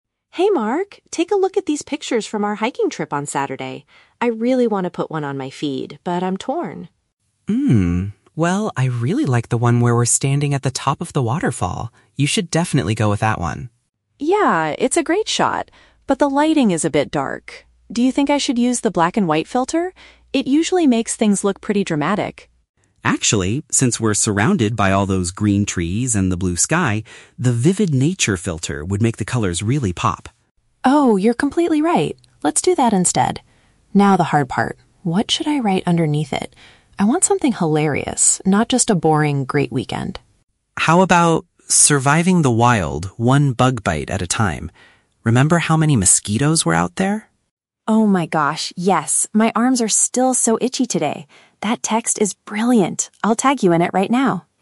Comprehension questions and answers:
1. What do the friends finally decide to do to improve the photo?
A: Make the natural colors stand out more.

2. Why does Sophie like Mark's idea for the photo's caption?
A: It makes a joke about a minor annoyance during their trip.

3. What is Sophie going to do next?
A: Include Mark's profile in her post.

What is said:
Sophie: Hey Mark, take a look at these pictures from our hiking trip on Saturday. I really want to put one on my feed, but I'm torn.
well, I really like the one where we're standing at the top of the waterfall. You should definitely go with that one.
Sophie: Yeah, it's a great shot. But the lighting is a bit dark. Do you think I should use the black-and-white filter? It usually makes things look pretty dramatic.
Mark: Actually, since we're surrounded by all those green trees and the blue sky, the 'vivid nature' filter would make the colors really pop.
Sophie: Oh, you're completely right. Let's do that instead. Now, the hard part... what should I write underneath it? I want something hilarious, not just a boring "Great weekend."
Mark: How about... "Surviving the wild, one bug bite at a time"? Remember how many mosquitoes were out there?
Sophie: Oh my gosh, yes! My arms are still so itchy today. That text is brilliant. I'll tag you in it right now.